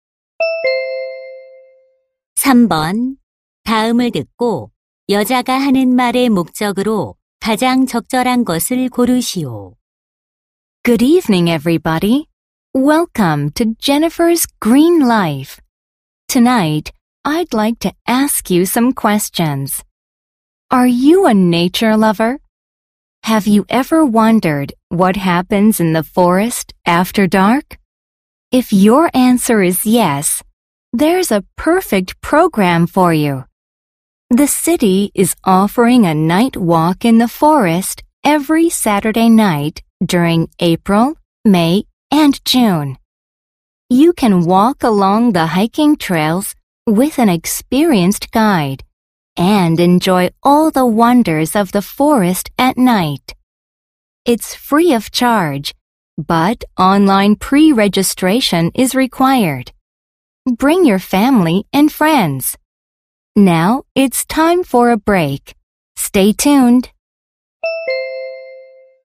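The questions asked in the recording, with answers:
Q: 다음을 듣고 여자가 하는 말의 목적으로 가장 적절한 것을 고르시오.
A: 야간 숲 걷기 프로그램을 홍보하려고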